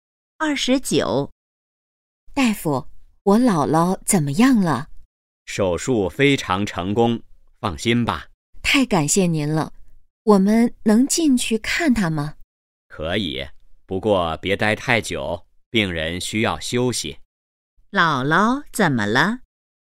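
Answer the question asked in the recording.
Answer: 做了手术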